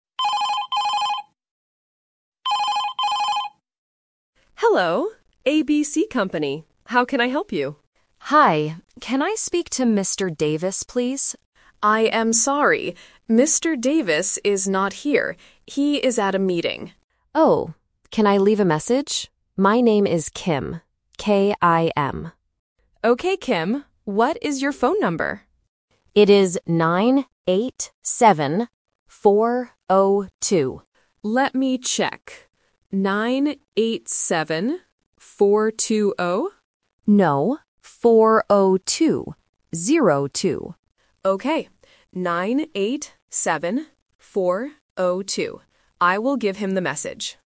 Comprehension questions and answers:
Listen to the conversation and choose the correct answer (A, B, or C).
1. Where is Mr. Davis?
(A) At a meeting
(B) At home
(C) In his office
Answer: At a meeting

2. How does the caller spell her name?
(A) T-I-M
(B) K-E-M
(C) K-I-M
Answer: K-I-M

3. What is Kim's correct phone number?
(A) 987-420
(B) 987-402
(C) 987-412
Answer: 987-402

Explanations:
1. The correct answer is A. The receptionist clearly says, "He is at a meeting." Option B (At home) is not mentioned. Option C (In his office) is a trap because the receptionist says he is "not here".
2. The correct answer is C. The caller spells her name clearly: "K-I-M". Option A (T-I-M) is a trap because "Tim" and "Kim" rhyme and sound very similar over the phone. Option B (K-E-M) is a trap because the letters "I" and "E" are often misheard by beginners.
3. The correct answer is B. Kim says her number is "9-8-7, 4-0-2". Option A (987-420) is the trap because the receptionist mishears the number as "4-2-0" before Kim corrects her. Option C is just a wrong number.

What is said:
Receptionist: Hello. ABC Company. How can I help you?
Caller: Hi. Can I speak to Mr. Davis, please?
Receptionist: I am sorry. Mr. Davis is not here. He is at a meeting.
Caller: Oh. Can I leave a message? My name is Kim. K-I-M.
Receptionist: Okay, Kim. What is your phone number?

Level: A1

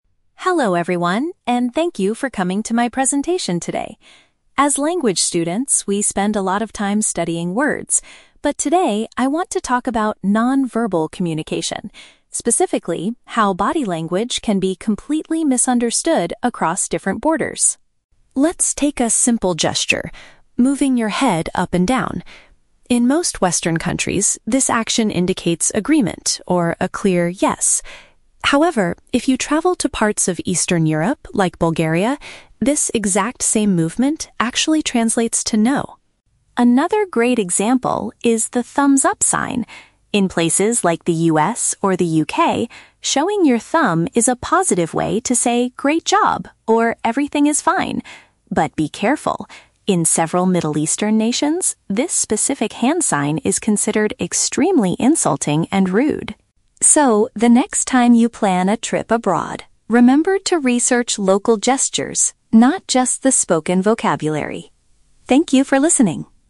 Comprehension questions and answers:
Listen to a student giving a presentation. Choose the correct answer (A, B, or C) for each question.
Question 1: What is the primary focus of the student's presentation?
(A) To teach the audience how to memorize foreign vocabulary faster.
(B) To explain how physical actions carry different meanings globally.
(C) To argue that Western body language is the most polite in the world.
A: To explain how physical actions carry different meanings globally.

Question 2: According to the speaker, what does moving one's head up and down mean in Bulgaria?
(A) It is a physical way to express a negative response.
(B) It is commonly used to show that a person strongly agrees.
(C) It is considered an incredibly offensive way to say hello.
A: It is a physical way to express a negative response.

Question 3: How might someone from the Middle East interpret a "thumbs-up" sign?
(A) They would think the person did a fantastic job on a project.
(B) They would assume the person is asking for directions.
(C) They would feel deeply offended by the disrespectful action.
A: They would feel deeply offended by the disrespectful action.

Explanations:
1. The student says the presentation is about "non-verbal communication" and how "body language can be completely misunderstood across different borders" (physical actions carry different meanings globally). Option (A) is a trap; the student mentions "studying words" and "spoken vocabulary", but points out that today's topic is not about that. Option (C) is never mentioned.
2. The speaker notes that in Bulgaria, this movement "actually translates to 'no'" (a negative response). Option (B) is a trap; this is what the gesture means in "most Western countries," not Bulgaria. Option (C) is a trap; the word "offensive" is used later, but it is to describe the thumbs-up sign, not nodding.
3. The student warns that in several Middle Eastern nations, the thumbs-up sign is "considered extremely insulting and rude" (deeply offended / disrespectful action). Option (A) is a trap; this is what the sign means in "places like the US or the UK", not the Middle East. Option (B) is not mentioned in the audio.

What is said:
Student: Hello everyone, and thank you for coming to my presentation today. As language students, we spend a lot of time studying words, but today I want to talk about non-verbal communication. Specifically, how body language can be completely misunderstood across different borders.
Let's take a simple gesture: moving your head up and down. In most Western countries, this action indicates agreement or a clear "yes." However, if you travel to parts of Eastern Europe, like Bulgaria, this exact same movement actually translates to "no."
Another great example is the thumbs-up sign. In places like the US or the UK, showing your thumb is a positive way to say "great job" or "everything is fine." But be careful! In several Middle Eastern nations, this specific hand sign is considered extremely insulting and rude.
So, the next time you plan a trip abroad, remember to research local gestures, not just the spoken vocabulary.

